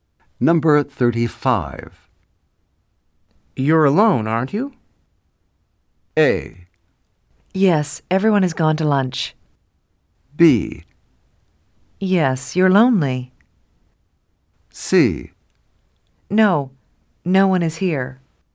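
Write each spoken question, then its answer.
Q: You're alone, aren't you?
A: A: Yes, everyone has gone to lunch.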